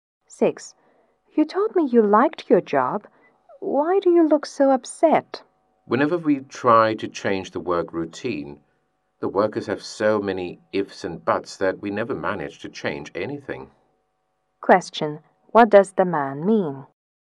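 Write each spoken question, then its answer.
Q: What does the man mean?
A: The workers resist any change to the work routine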